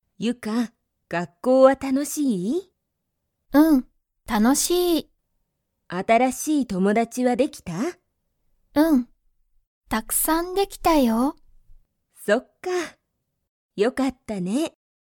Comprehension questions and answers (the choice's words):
Comprehension Quiz (Skip if you don't understand the conversation yet)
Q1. ユカは、新(あたら)しい____ができた。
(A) 学校(がっこう)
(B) 電話(でんわ)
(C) 車(くるま)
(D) 友達(ともだち)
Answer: 友達(ともだち)

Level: Level 1